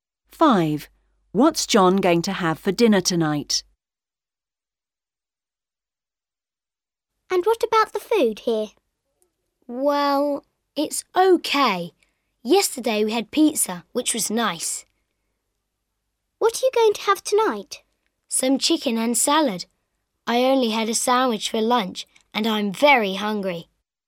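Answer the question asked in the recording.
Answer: Chicken and salad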